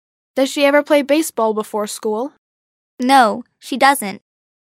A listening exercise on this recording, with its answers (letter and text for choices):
«با توجه به فایل صوتی، گزینه مناسب را انتخاب کنید»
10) Does she ever play baseball before school?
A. Yes, she does.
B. No, she doesn't.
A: B. No, she doesn't.